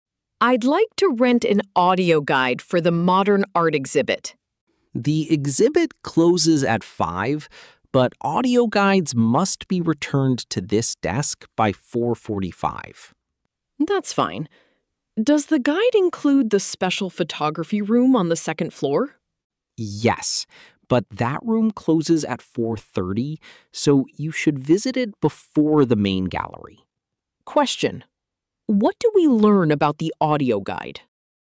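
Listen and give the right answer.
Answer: It must be returned by 4:45 and includes the photography room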